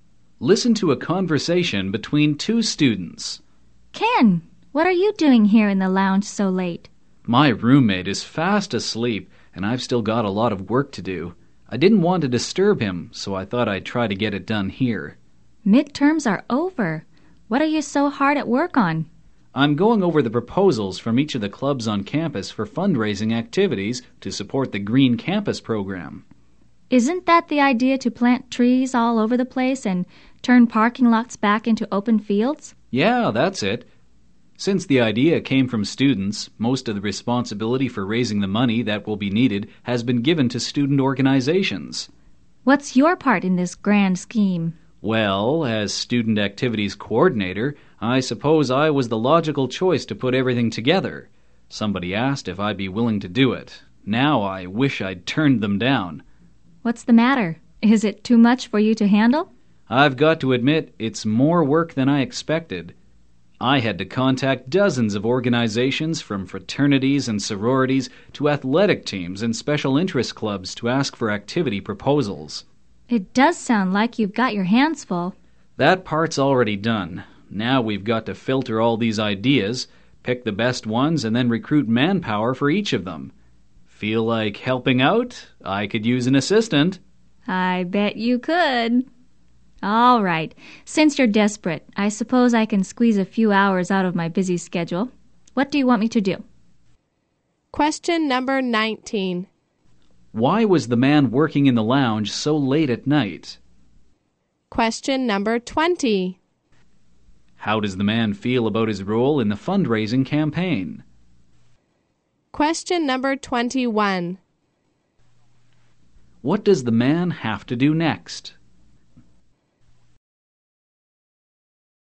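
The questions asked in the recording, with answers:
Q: Why was the man working in the lounge so late at night?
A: He didn't want to disturb his sleeping roommate.

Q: How does the man feel about his role in the fundraising campaign?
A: He regrets accepting it; it's more work than he expected.

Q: What does the man have to do next?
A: Filter the proposals, pick the best ones, and recruit people for them.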